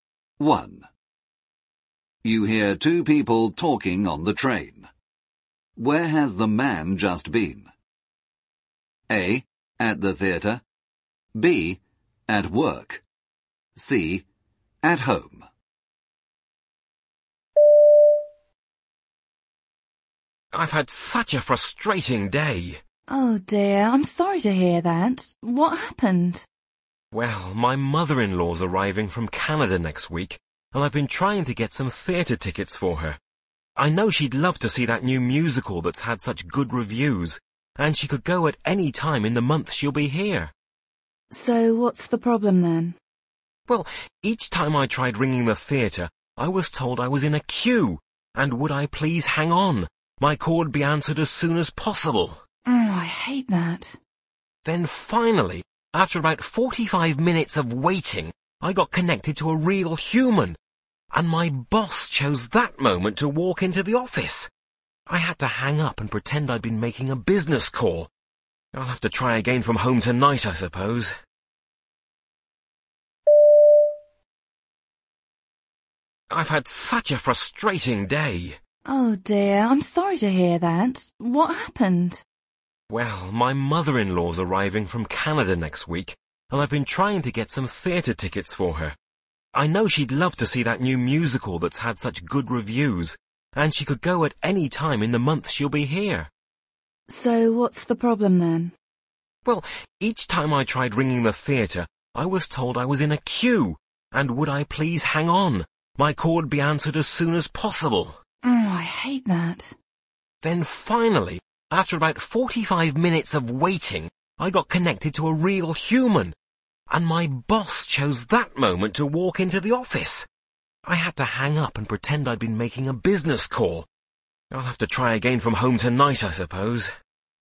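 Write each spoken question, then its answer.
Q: Where has the man just been?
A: B: At work.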